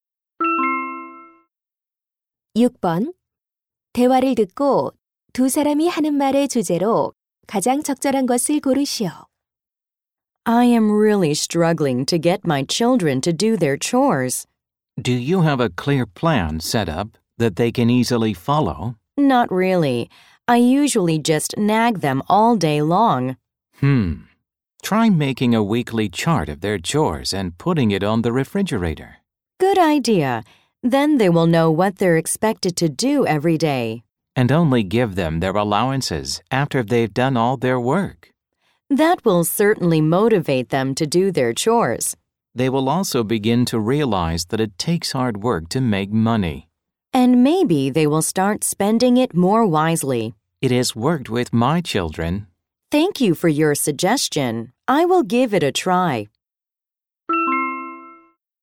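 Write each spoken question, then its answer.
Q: 대화를 듣고 두 사람이 하는 말의 주제로 가장 적절한 것을 고르시오.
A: 아이들이 집안일을 하게 하는 방법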